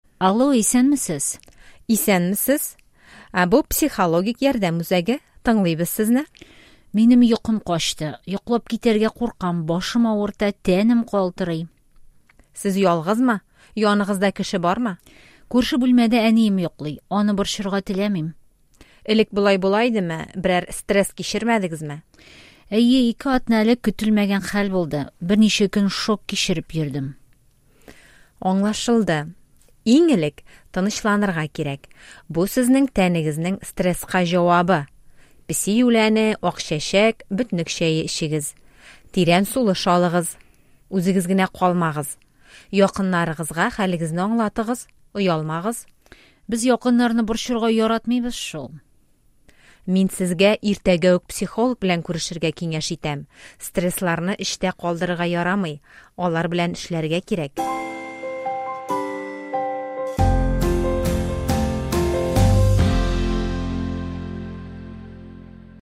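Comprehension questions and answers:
Ответьте на вопросы по диалогу.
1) Әнисә кая һәм кайчан шалтыра?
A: Психологик ярдәм үзәгенә, төнлә (йокысы качкач)

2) Әнисә кем белән яши?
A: Әнисе белән

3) Кызны нәрсә борчый?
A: Йокысы качкан, йоклап китәргә курка, башы авырта, тәне калтырый

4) Белгече Әнисәгә иң элек нәрсә эшләргә кирәк ди?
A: Тынычланырга

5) Ул аңа тагын нинди киңәшләр бирә?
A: Песи үләне, акчәчәк, бөтнек чәе эчәргә, тирән сулыш алырга, ялгыз калмаска, якыннарына хәлен аңлатырга, иртәгә психолог белән күрешергә

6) Стресслар белән ничек эшләргә кирәк?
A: Аларны эчтә калдырырга ярамый, алар белән эшләргә кирәк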